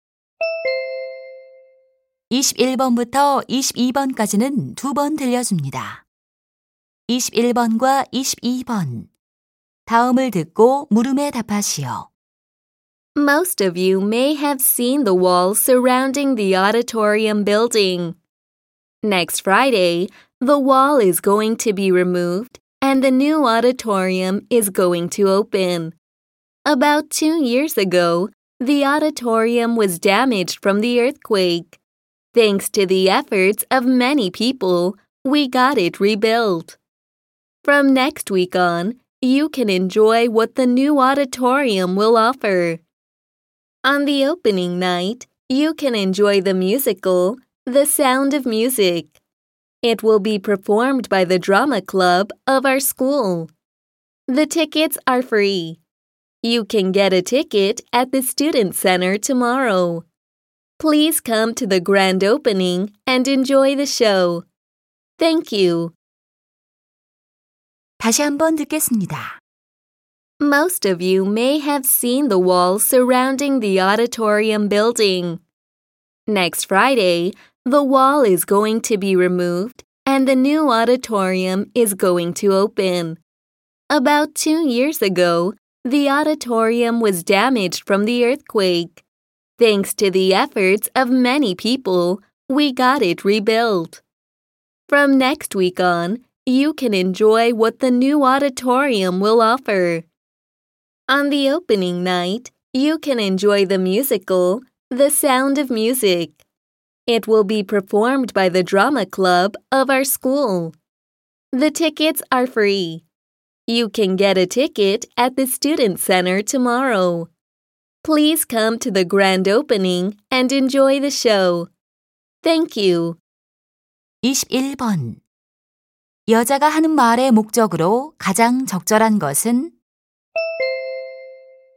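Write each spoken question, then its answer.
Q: 여자가 하는 말의 목적으로 가장 적절한 것은?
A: 새 강당 개관 행사 안내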